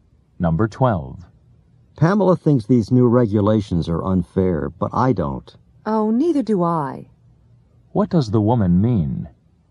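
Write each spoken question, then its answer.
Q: What does the woman mean?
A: She also doesn't think the new regulations are unfair.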